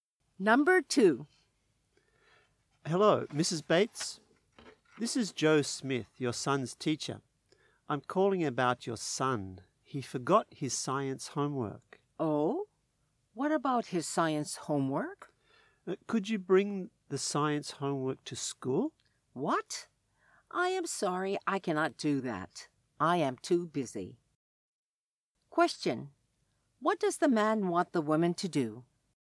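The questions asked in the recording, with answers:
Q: What does the man want the woman to do?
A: Bring her son's science homework to school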